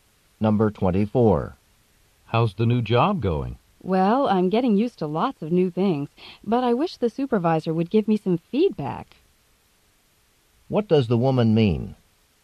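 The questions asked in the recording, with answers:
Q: What does the woman mean?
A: She wants her supervisor to tell her how she is doing in her new job.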